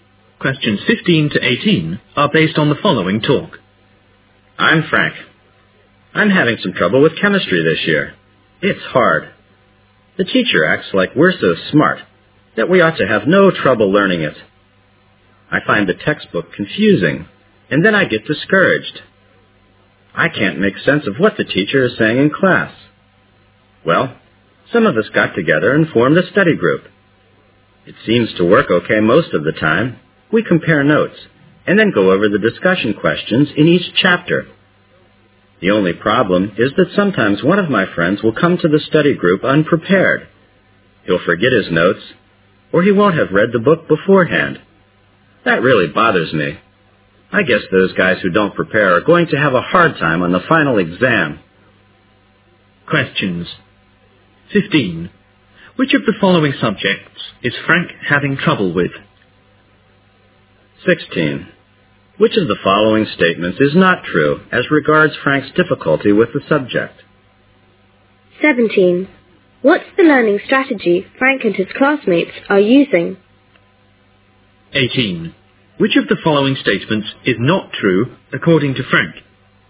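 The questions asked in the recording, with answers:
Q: Which of the following subjects is Frank having trouble with?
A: Chemistry

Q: What's the learning strategy Frank and his classmates are using?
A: A study group where they compare notes and go over discussion questions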